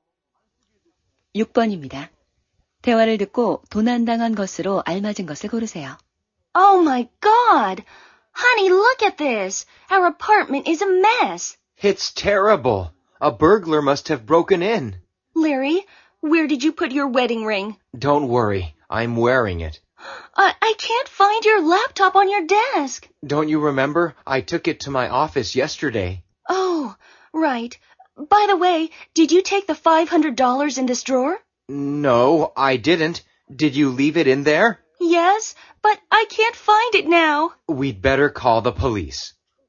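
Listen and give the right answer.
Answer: 서랍 속의 500달러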